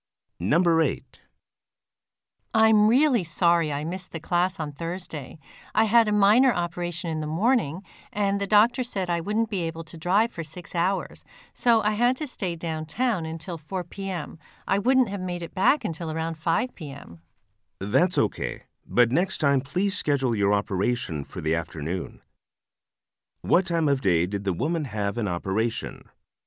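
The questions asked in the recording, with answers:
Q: What time of day did the woman have an operation?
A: In the morning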